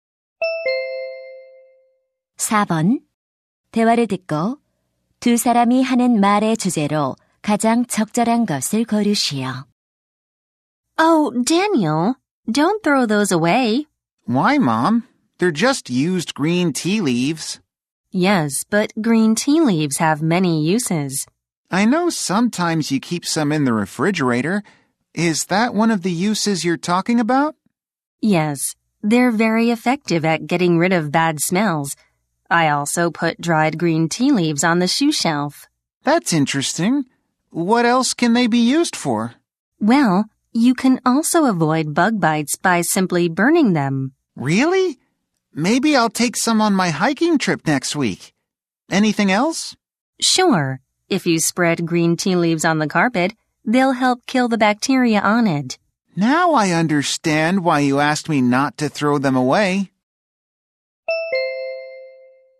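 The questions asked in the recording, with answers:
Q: 대화를 듣고 두 사람이 하는 말의 주제로 가장 적절한 것을 고르시오.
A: 다 쓴 녹차 잎의 다양한 활용법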